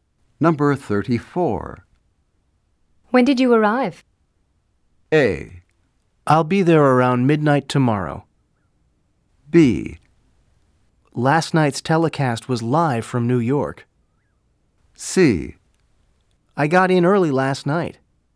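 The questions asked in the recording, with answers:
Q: When did you arrive?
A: C: I got in early last night.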